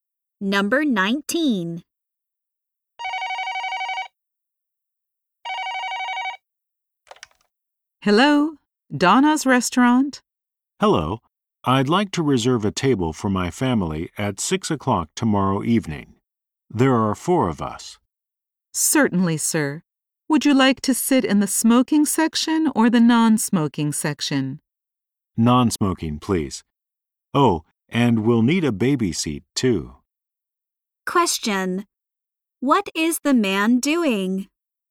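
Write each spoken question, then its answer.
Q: What is the man doing?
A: Reserving a table at a restaurant.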